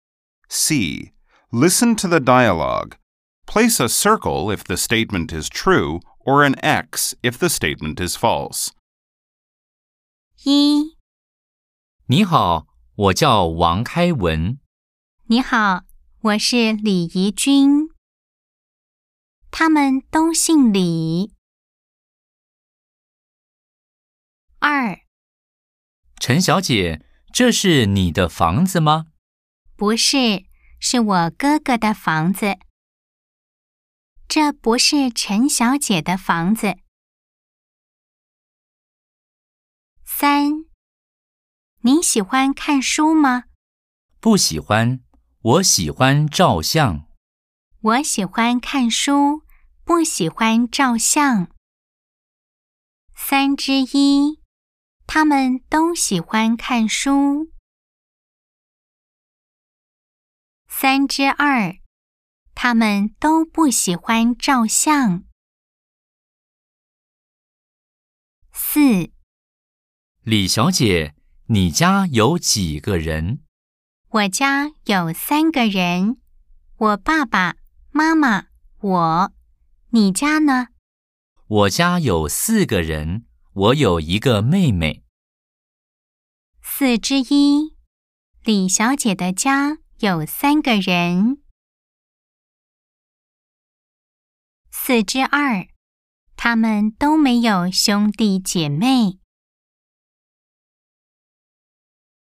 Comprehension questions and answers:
C. Nghe đoạn hội thoại. Nếu đúng đánh ⭕, sai đánh ❌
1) 他們都姓李。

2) 這不是陳小姐的房子。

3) 他們喜歡看書。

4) 他們都不喜歡照相。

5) 李小姐的家有三個人。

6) 他們都沒有兄弟姐妹。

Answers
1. O
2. O
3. X
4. X
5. O
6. X

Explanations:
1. A:你好,我叫李開文。 B:你好,我是李義軍。
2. A:陳小姐,這是你的房子嗎? B:不是,是我哥哥的房子。
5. B:我家有三個人,我爸爸,媽媽,我。你家呢?